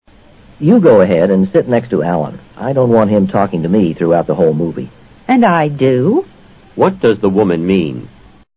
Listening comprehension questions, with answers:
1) What does the woman mean?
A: She doesn't want to be disturbed either.